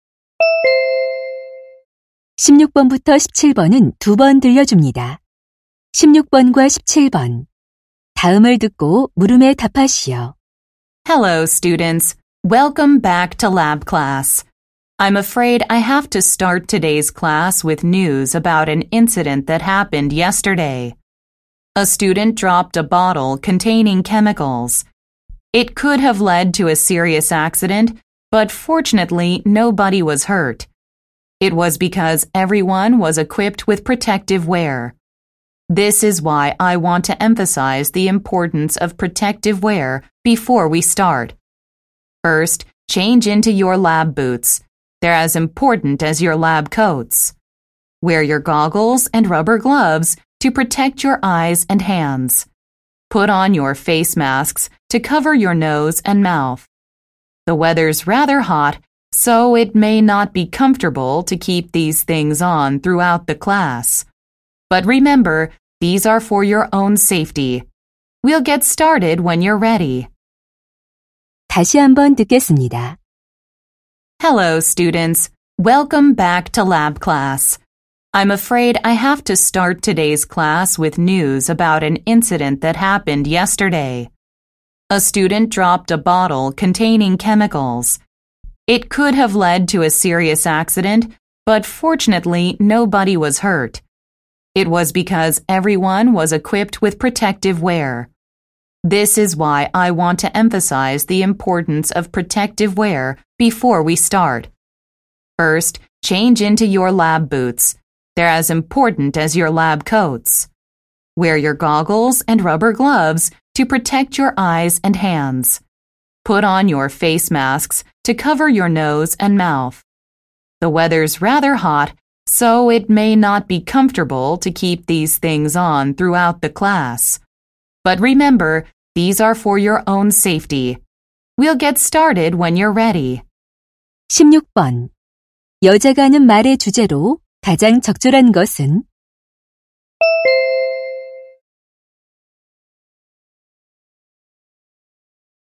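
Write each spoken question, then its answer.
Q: 여자가 하는 말의 주제로 가장 적절한 것은?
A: 실험실 보호 장비 착용의 중요성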